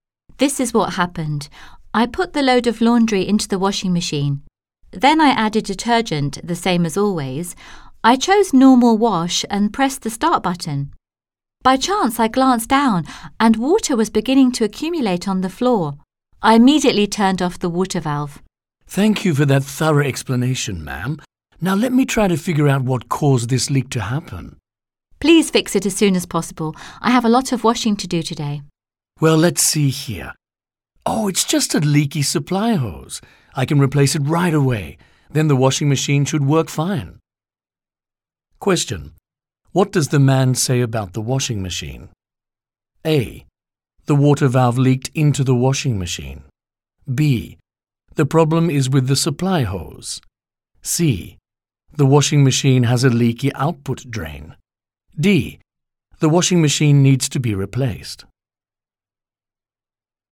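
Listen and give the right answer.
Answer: B: The problem is with the supply hose.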